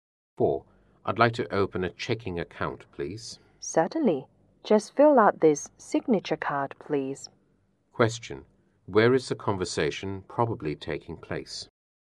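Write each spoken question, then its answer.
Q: Where is the conversation probably taking place?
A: In a bank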